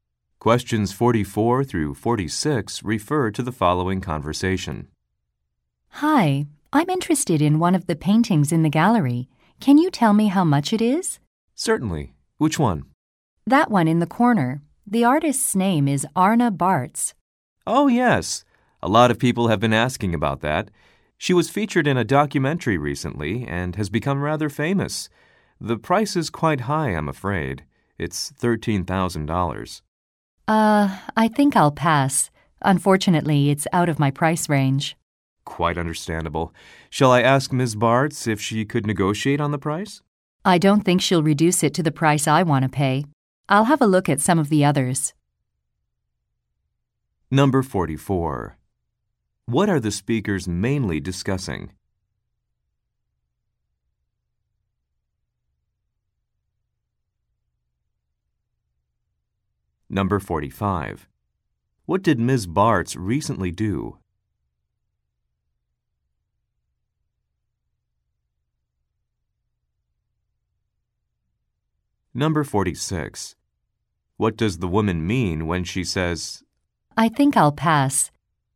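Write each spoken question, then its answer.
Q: What are the speakers mainly discussing?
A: The price of a painting

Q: What did Ms. Bartz recently do?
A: She was featured in a documentary

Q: What does the woman mean when she says,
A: She won't buy it because it's too expensive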